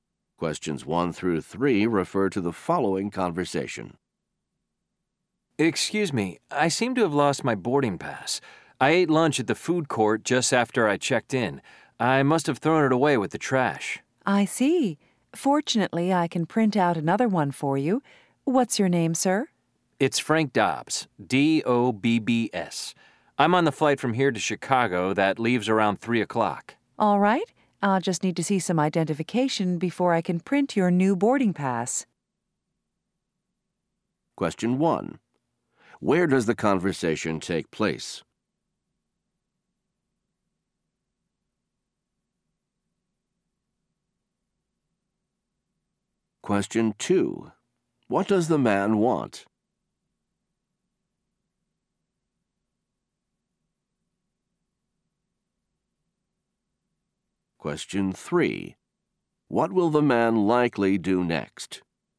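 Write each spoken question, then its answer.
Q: Where does the conversation take place?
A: At an airport

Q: What does the man want?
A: A new boarding pass

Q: What will the man likely do next?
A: Show identification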